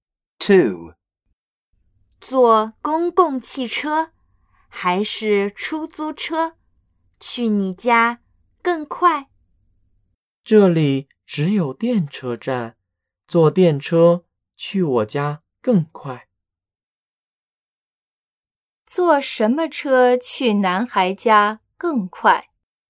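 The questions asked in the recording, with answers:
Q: 坐什么车去男孩家更快?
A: 电车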